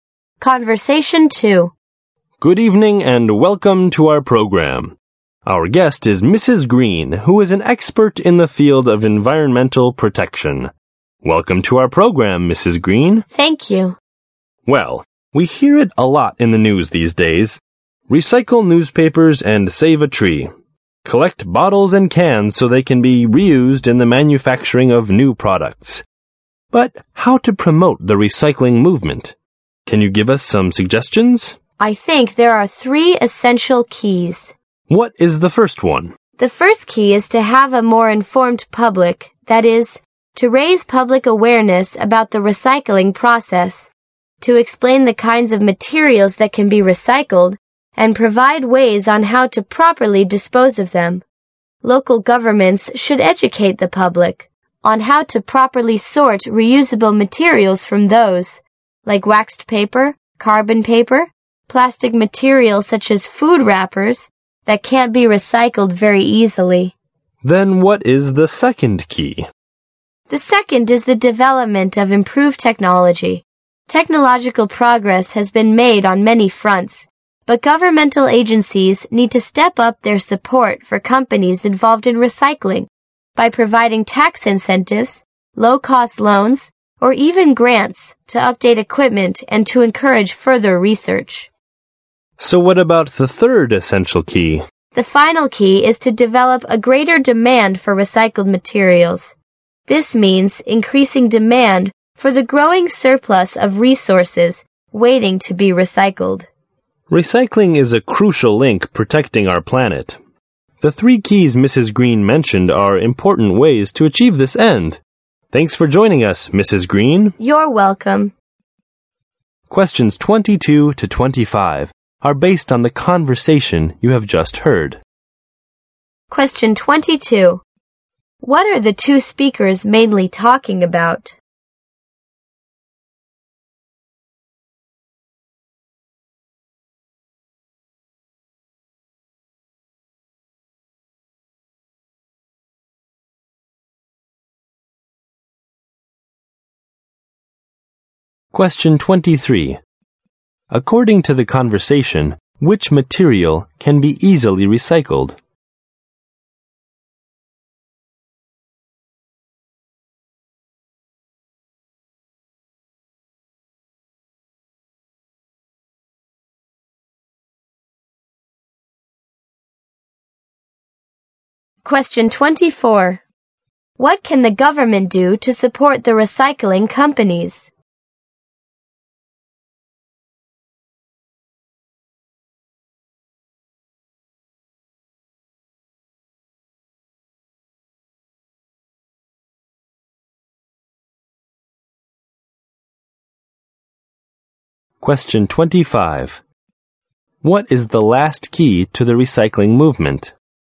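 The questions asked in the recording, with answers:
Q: What are the two speakers mainly talking about?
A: How to promote recycling

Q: What can the government do to support the recycling companies?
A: Provide tax incentives, low-cost loans or grants

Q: What is the last key to the recycling movement?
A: Developing greater demand for recycled materials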